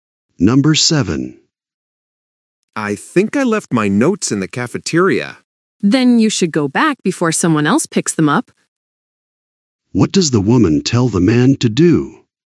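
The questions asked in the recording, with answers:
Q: What does the woman tell the man to do?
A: Go back to the cafeteria for the notes quickly.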